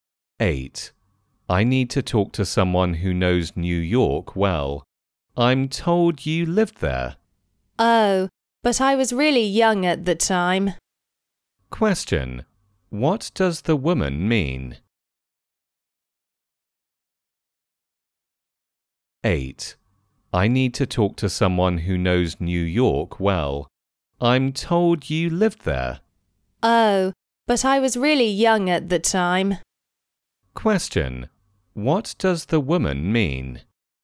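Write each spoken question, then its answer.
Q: What does the woman mean?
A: She may not know New York well because she was very young when she lived there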